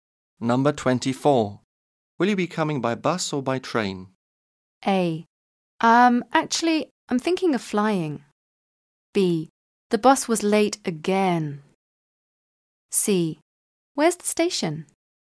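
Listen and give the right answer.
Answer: A: Actually, I'm thinking of flying.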